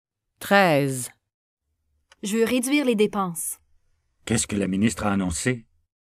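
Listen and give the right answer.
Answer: La ministre a annoncé qu'elle voulait réduire les dépenses.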